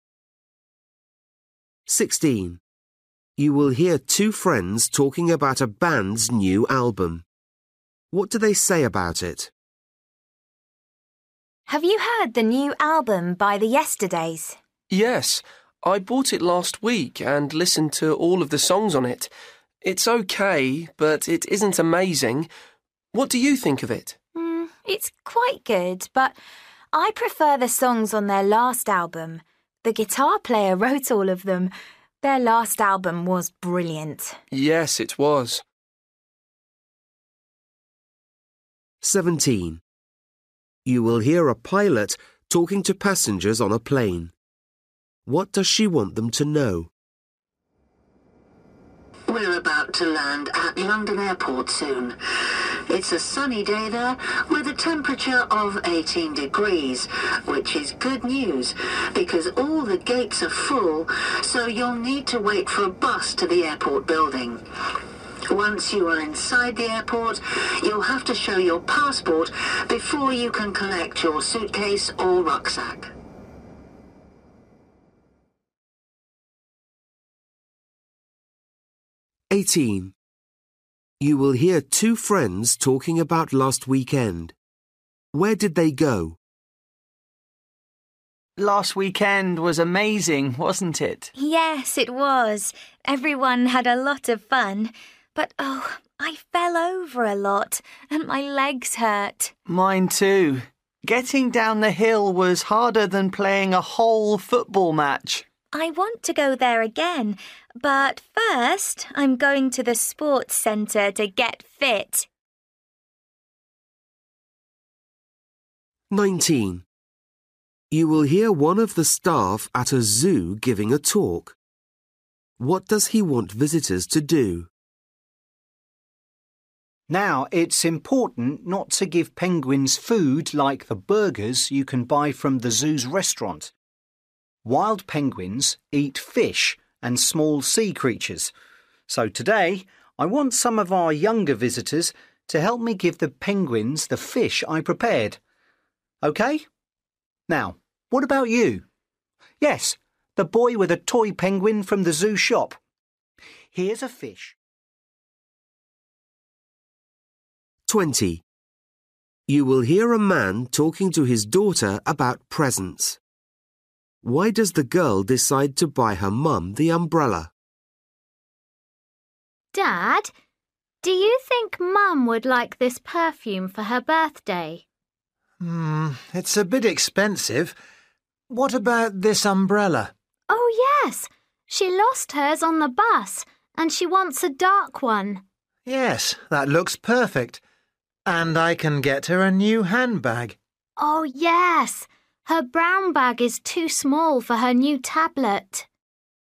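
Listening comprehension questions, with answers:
For each question, choose the correct answer.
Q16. You will hear two friends talking about a bank's new album. What do they say about it?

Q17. You will hear a pilot talking to passengers on a plane. What does she want them to know?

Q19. You will hear one of the staff at a zoo giving a talk. What does he want visitors to do?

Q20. You will hear a man talking to his daughter about presents. Why does the girl decide to buy her mum the umbrella?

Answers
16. It's okay but not as good as their last album.
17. They will need to wait for a bus to the airport building.
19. Help him feed fish to the penguins.
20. Her mum lost hers on the bus.

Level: Luyện nghe trình độ A2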